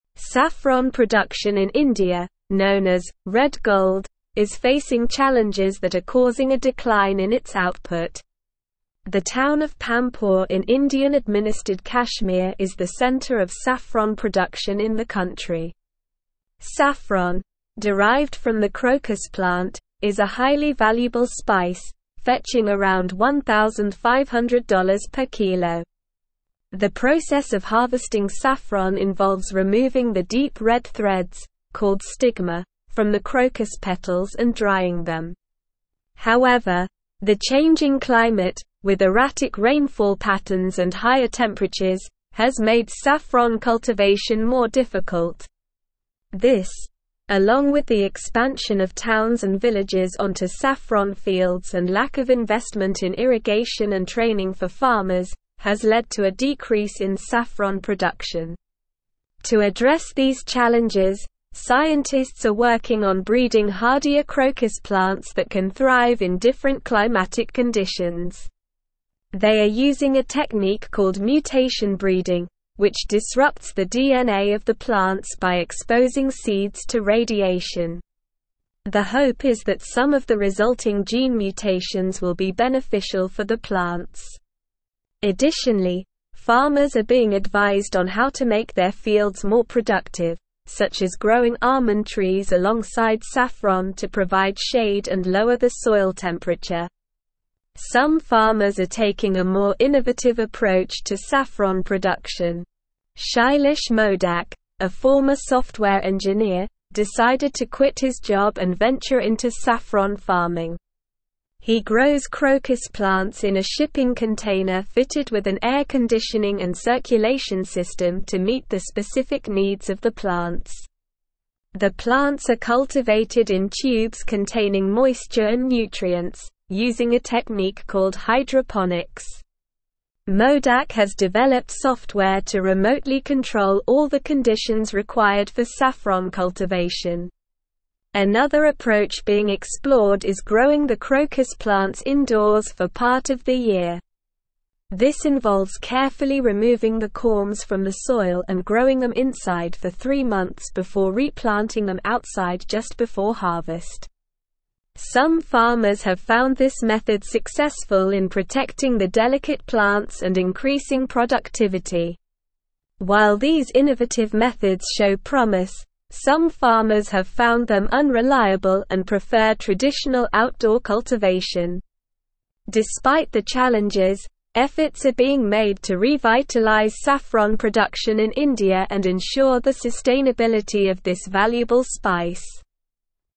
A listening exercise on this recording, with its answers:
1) Saffron production in India, known as "red gold," is facing challenges that are causing a decline in its (1)______.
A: output

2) The town of Pampore in Indian-administered (2)______ is the center of saffron production in the country.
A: Kashmir

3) The process of harvesting saffron involves (3)______ the deep-red threads, called stigma, from the crocus petals and drying them.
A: removing

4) However, the changing climate, with erratic (4)______ patterns and higher temperatures, has made saffron cultivation more difficult.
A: rainfall

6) This, along with the expansion of towns and villages onto (5)______ fields and lack of (6)______ in irrigation and training for farmers, has led to a (7)______ in saffron production.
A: investment

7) This, along with the expansion of towns and villages onto (5)______ fields and lack of (6)______ in irrigation and training for farmers, has led to a (7)______ in saffron production.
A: decrease

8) They are using a technique (8)______ mutation breeding, which disrupts the DNA of the plants by exposing seeds to radiation.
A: called

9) Additionally, farmers are being advised on how to make their fields more productive, such as growing almond trees alongside saffron to (9)______ shade and lower the soil temperature.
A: provide

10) Some farmers are taking a more innovative (10)______ to saffron production.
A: approach

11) Shailesh Modak, a former software engineer, decided to quit his job and venture into saffron (11)______.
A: farming

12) Modak has developed software to remotely (12)______ all the conditions required for saffron cultivation.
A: control

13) Some farmers have found this (13)______ successful in protecting the delicate plants and increasing productivity.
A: method

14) While these innovative methods show promise, some farmers have found them unreliable and (14)______ traditional outdoor cultivation.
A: prefer

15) Despite the challenges, efforts are being made to revitalize saffron production in India and (15)______ the sustainability of this valuable (16)______.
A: ensure

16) Despite the challenges, efforts are being made to revitalize saffron production in India and (15)______ the sustainability of this valuable (16)______.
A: spice

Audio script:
Saffron production in India, known as "red gold," is facing challenges that are causing a decline in its output. The town of Pampore in Indian-administered Kashmir is the center of saffron production in the country. Saffron, derived from the crocus plant, is a highly valuable spice, fetching around $1,500 per kilo. The process of harvesting saffron involves removing the deep-red threads, called stigma, from the crocus petals and drying them. However, the changing climate, with erratic rainfall patterns and higher temperatures, has made saffron cultivation more difficult. This, along with the expansion of towns and villages onto saffron fields and lack of investment in irrigation and training for farmers, has led to a decrease in saffron production.
To address these challenges, scientists are working on breeding hardier crocus plants that can thrive in different climatic conditions. They are using a technique called mutation breeding, which disrupts the DNA of the plants by exposing seeds to radiation. The hope is that some of the resulting gene mutations will be beneficial for the plants. Additionally, farmers are being advised on how to make their fields more productive, such as growing almond trees alongside saffron to provide shade and lower the soil temperature.
Some farmers are taking a more innovative approach to saffron production. Shailesh Modak, a former software engineer, decided to quit his job and venture into saffron farming. He grows crocus plants in a shipping container fitted with an air conditioning and circulation system to meet the specific needs of the plants. The plants are cultivated in tubes containing moisture and nutrients, using a technique called hydroponics. Modak has developed software to remotely control all the conditions required for saffron cultivation.
Another approach being explored is growing the crocus plants indoors for part of the year. This involves carefully removing the corms from the soil and growing them inside for three months before replanting them outside just before harvest. Some farmers have found this method successful in protecting the delicate plants and increasing productivity.
While these innovative methods show promise, some farmers have found them unreliable and prefer traditional outdoor cultivation. Despite the challenges, efforts are being made to revitalize saffron production in India and ensure the sustainability of this valuable spice.

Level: Level 4